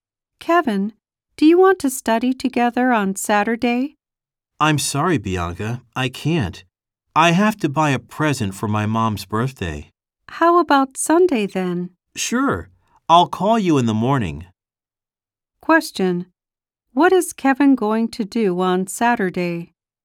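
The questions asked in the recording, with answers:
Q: What is Kevin going to do on Saturday?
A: Buy a present for his mom's birthday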